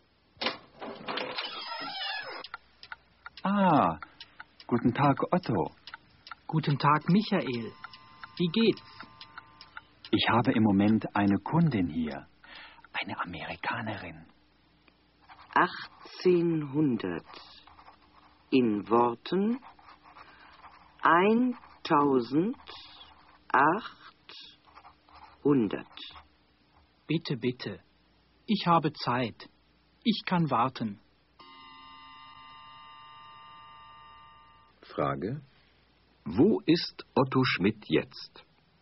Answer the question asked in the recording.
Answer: Er ist jetzt in Michaels Geschäft.